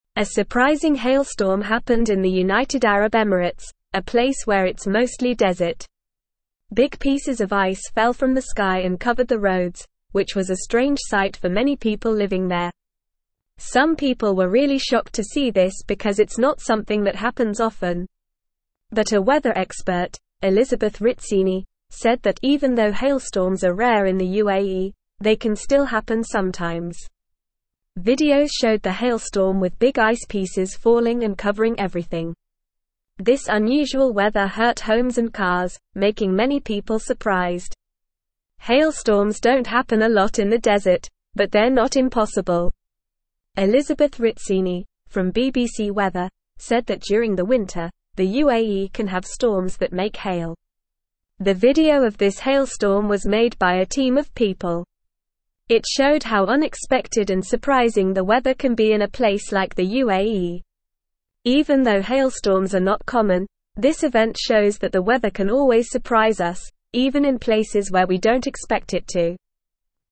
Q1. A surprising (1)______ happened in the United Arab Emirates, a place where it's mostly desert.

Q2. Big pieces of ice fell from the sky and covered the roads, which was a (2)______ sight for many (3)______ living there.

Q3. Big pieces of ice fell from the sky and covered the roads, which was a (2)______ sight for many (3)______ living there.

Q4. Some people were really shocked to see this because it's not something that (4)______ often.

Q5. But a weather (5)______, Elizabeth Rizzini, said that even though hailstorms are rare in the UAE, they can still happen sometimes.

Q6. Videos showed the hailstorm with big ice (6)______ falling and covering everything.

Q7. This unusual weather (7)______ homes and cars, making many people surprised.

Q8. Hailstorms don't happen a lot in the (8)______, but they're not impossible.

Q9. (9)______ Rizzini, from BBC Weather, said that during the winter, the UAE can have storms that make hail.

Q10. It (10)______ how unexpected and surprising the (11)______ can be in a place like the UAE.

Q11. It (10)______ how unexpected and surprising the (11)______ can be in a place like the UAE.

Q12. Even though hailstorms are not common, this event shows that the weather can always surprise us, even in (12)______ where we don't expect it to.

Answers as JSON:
{"1": "hailstorm", "2": "strange", "3": "people", "4": "happens", "5": "expert", "6": "pieces", "7": "hurt", "8": "desert", "9": "Elizabeth", "10": "showed", "11": "weather", "12": "places"}

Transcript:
A surprising hailstorm happened in the United Arab Emirates, a place where it's mostly desert. Big pieces of ice fell from the sky and covered the roads, which was a strange sight for many people living there. Some people were really shocked to see this because it's not something that happens often. But a weather expert, Elizabeth Rizzini, said that even though hailstorms are rare in the UAE, they can still happen sometimes.
Videos showed the hailstorm with big ice pieces falling and covering everything. This unusual weather hurt homes and cars, making many people surprised. Hailstorms don't happen a lot in the desert, but they're not impossible. Elizabeth Rizzini, from BBC Weather, said that during the winter, the UAE can have storms that make hail.
The video of this hailstorm was made by a team of people. It showed how unexpected and surprising the weather can be in a place like the UAE. Even though hailstorms are not common, this event shows that the weather can always surprise us, even in places where we don't expect it to.

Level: Level 2